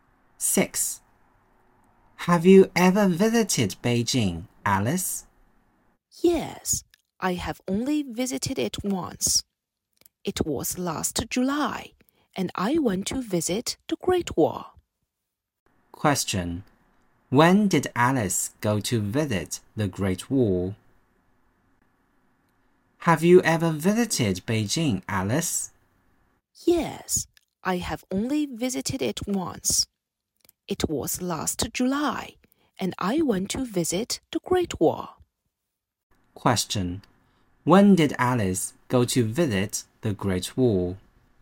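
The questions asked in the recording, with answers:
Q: When did Alice go to visit the Great Wall?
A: Last July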